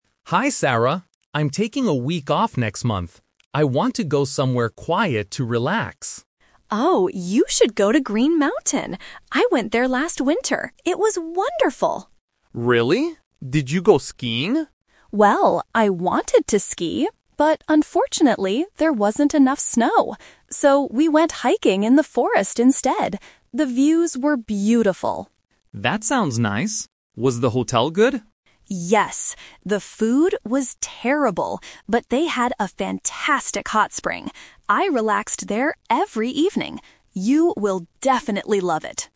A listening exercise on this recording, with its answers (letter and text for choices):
Listen to two colleagues talking about a holiday destination. Choose the correct answer (A, B, or C) for each question.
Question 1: What activity did Sarah do at Green Mountain?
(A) She went skiing.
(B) She went hiking.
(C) She went swimming.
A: (B) She went hiking.

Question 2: Why didn't Sarah do her planned activity?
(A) Because she was too tired.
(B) Because there was not enough snow.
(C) Because the forest was closed.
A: (B) Because there was not enough snow.

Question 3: What did Sarah think about the hotel?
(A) She loved the hot spring.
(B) She thought the food was delicious.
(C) She liked the big rooms.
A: (A) She loved the hot spring.

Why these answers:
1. Sarah says, "So, we went hiking in the forest instead." Why the traps are wrong: Option (A) is the "Twist" trap. Mark asks if she went skiing, and she wanted to, but didn't do it. Option (C) is a plausible holiday activity but is never mentioned in the audio.
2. Sarah clearly states the reason she couldn't ski: "...unfortunately, there wasn't enough snow." Why the traps are wrong: Option (A) is a trap because "tired" is a common reason to cancel plans, but it's not the reason here. Option (C) mentions "the forest" (a word from the audio), but the forest wasn't closed—she actually went hiking there.
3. Sarah says they had a "fantastic hot spring" and she "relaxed there every evening." Why the traps are wrong: Option (B) is a direct trap. She mentions the food, but she says it was "terrible" (bad), not delicious. Option (C) is not mentioned in the conversation at all.

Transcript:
Mark: Hi Sarah! I'm taking a week off next month. I want to go somewhere quiet to relax.
Sarah: Oh, you should go to Green Mountain! I went there last winter. It was wonderful.
Mark: Really? Did you go skiing?
Sarah: Well, I wanted to ski, but unfortunately, there wasn't enough snow. So, we went hiking in the forest instead. The views were beautiful!
Mark: That sounds nice. Was the hotel good?
Sarah: Yes! The food was terrible, but they had a fantastic hot spring. I relaxed there every evening. You will definitely love it.